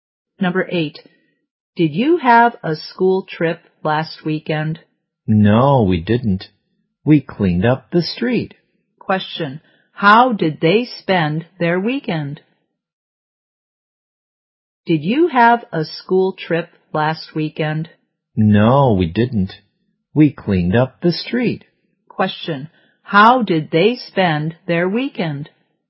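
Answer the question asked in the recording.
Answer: They cleaned up the street.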